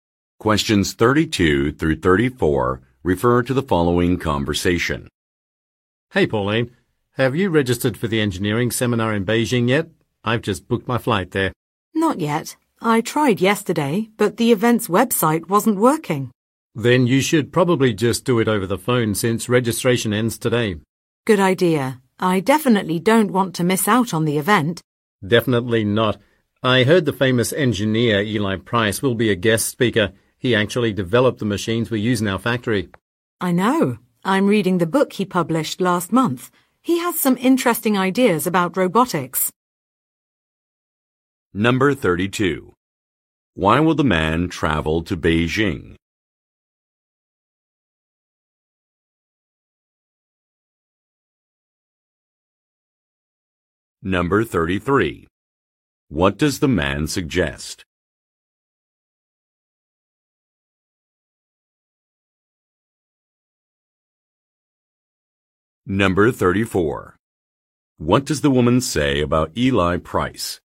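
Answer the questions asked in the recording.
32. To attend an engineering seminar
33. Registering for the seminar over the phone
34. She is reading the book he published last month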